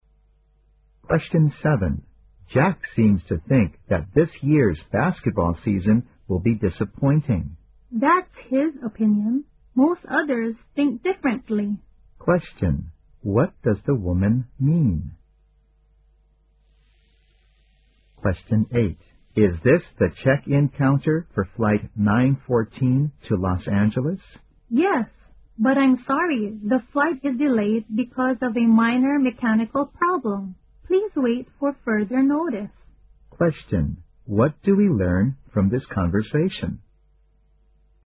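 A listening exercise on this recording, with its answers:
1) Q: What does the woman mean?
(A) She does not agree with Jack.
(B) Jack's performance is disappointing.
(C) Most people will find basketball boring.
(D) She shares Jack's opinion.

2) Q: What do we learn from this conversation?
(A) The man went to a wrong check-in counter.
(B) The man has just missed his flight.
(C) The plane will leave at 9:14.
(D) The plane's departure time remains unknown.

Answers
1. A
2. D

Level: 四级

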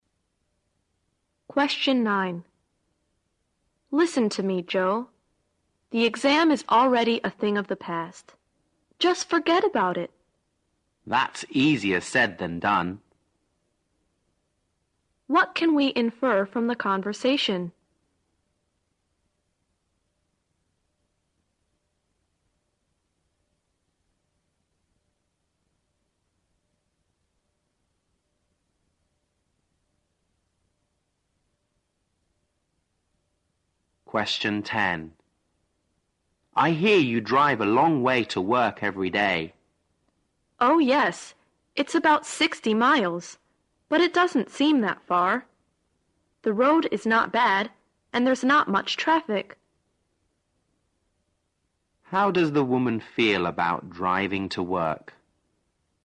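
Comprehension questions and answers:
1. What can we infer from the conversation?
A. The exam was easier than the previous one.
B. Joe is sure that he will do better in the next exam.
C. Joe probably failed in the exam.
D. The oral part of the exam was easier than the written part.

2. How does the woman feel about driving to work?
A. She is tired of driving in heavy traffic.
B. She doesn't mind it as the road conditions are good.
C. She is unhappy to have to drive such a long way every day.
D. She enjoys it because she's good at driving.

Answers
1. C
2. B

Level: 四级

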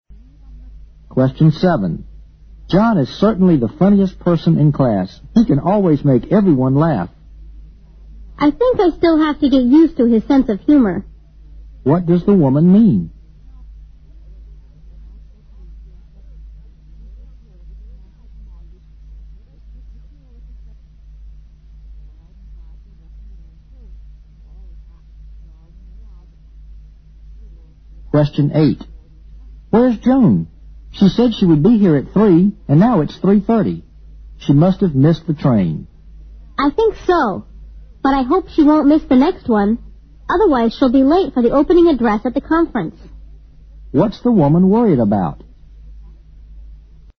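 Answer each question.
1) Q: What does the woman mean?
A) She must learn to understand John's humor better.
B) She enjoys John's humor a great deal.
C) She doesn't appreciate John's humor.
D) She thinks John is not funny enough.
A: A

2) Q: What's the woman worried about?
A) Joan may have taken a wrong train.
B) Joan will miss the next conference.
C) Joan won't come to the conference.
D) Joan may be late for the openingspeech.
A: D

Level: 六级

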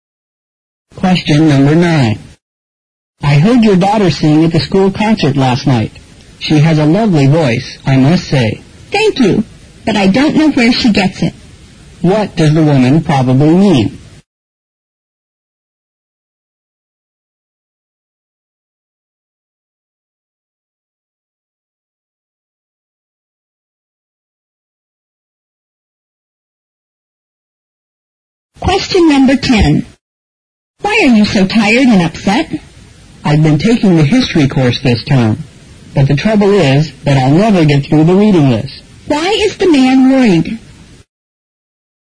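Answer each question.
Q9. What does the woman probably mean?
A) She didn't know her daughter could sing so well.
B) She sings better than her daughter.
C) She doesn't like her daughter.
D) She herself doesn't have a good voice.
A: D

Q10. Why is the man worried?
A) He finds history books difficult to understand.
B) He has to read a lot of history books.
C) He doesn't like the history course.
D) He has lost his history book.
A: B

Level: 六级

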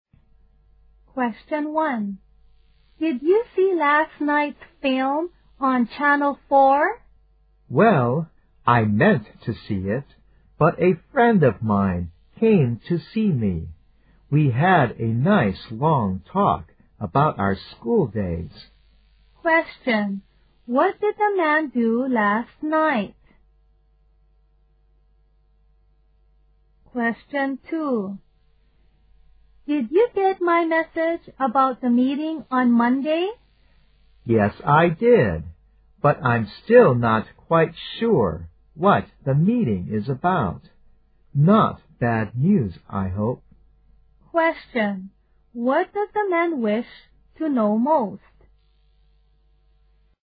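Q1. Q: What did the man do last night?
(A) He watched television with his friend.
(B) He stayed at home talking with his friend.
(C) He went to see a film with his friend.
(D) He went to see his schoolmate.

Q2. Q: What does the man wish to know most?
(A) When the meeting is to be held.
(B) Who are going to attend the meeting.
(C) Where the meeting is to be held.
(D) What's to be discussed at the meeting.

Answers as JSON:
{"1": "B", "2": "D"}

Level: 大学英语四级

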